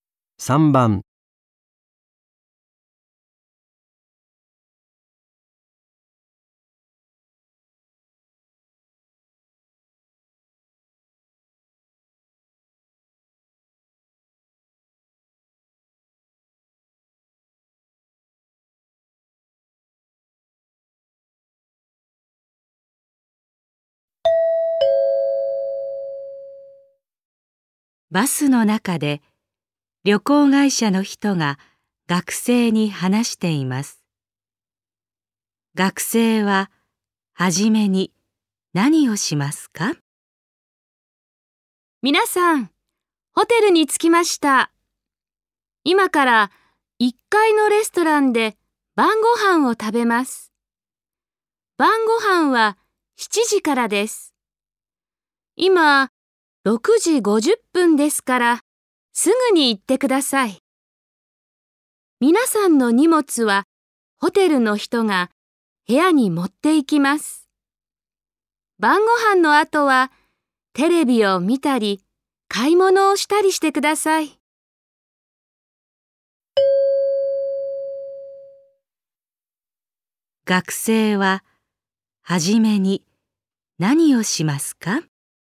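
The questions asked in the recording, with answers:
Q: 学生は初めに何をしますか?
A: 1階のレストランで晩ご飯を食べる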